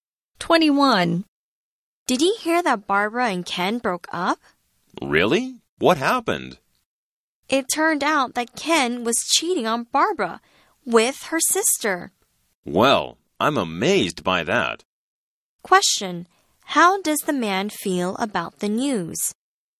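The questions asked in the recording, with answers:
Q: How does the man feel about the news?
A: Amazed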